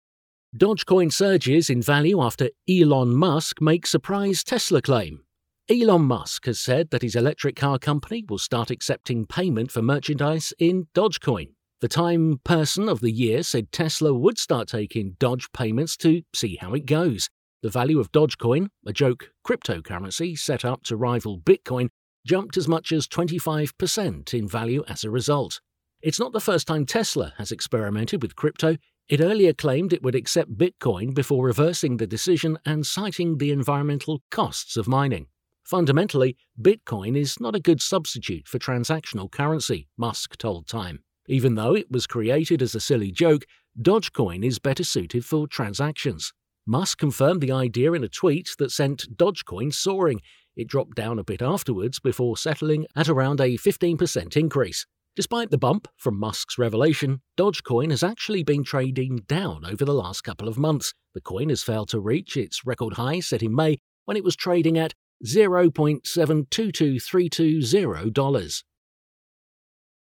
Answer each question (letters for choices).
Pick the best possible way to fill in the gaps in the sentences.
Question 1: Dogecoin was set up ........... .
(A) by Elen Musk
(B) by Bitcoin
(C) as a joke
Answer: C

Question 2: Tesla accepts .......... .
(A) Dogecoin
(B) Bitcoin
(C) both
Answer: A

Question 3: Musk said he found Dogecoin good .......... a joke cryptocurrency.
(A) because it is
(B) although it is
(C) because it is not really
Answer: B

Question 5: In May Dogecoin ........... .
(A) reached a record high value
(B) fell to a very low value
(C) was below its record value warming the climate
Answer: A

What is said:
Elon Musk has said that his electric car company will start accepting payment for merchandise in Dogecoin.
The Time person of the year said Tesla would start taking Doge payments to 'see how it goes'.
The value of Dogecoin (a joke cryptocurrency set up to rival Bitcoin) jumped as much as 25 per cent in value as a result.
It's not the first time Tesla has experimented with crypto. It earlier claimed it would accept Bitcoin before reversing the decision and citing the environmental costs of mining.
'Fundamentally, Bitcoin is not a good substitute for transactional currency,' Musk told Time.
'Even though it was created as a silly joke, Dogecoin is better suited for transactions.'
Musk confirmed the idea in a tweet that sent Dogecoin soaring. It dropped down a bit afterwards before settling at around a 15 per cent increase.
Despite the bump from Musk's revelation, Dogecoin has actually been trading down over the last couple of months.
The coin has failed to reach its record high set in May when it was trading at $0.722320.